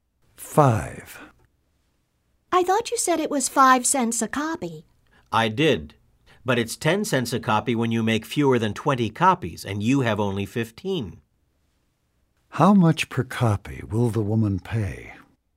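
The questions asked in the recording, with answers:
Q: How much per copy will the woman pay?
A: 10 cents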